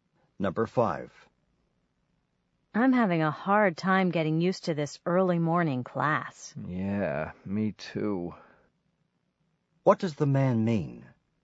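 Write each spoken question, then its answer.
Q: What does the man mean?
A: He is also having trouble getting used to the early morning class.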